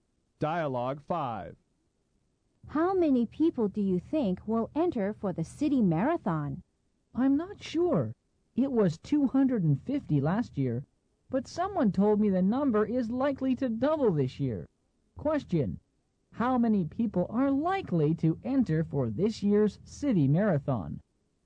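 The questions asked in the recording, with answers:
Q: How many people are likely to enter for this year's city marathon?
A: About 500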